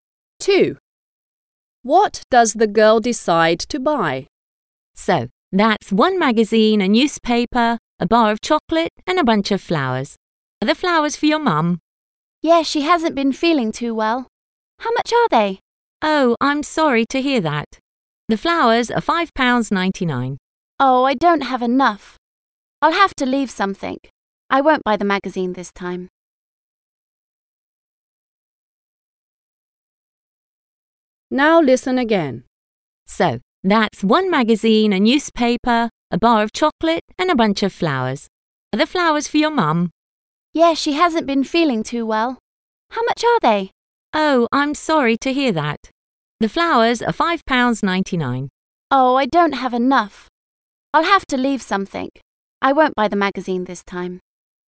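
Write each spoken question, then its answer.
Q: What does the girl decide to buy?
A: a newspaper, a bar of chocolate and flowers (not the magazine)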